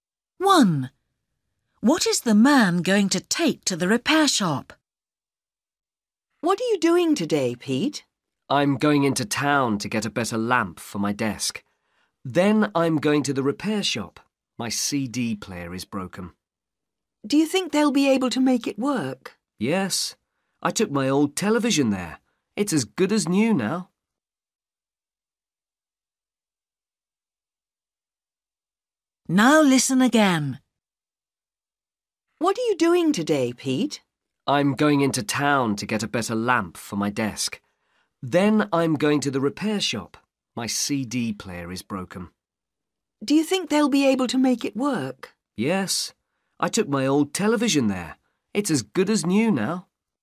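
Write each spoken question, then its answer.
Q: What is the man going to take to the repair shop?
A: his CD player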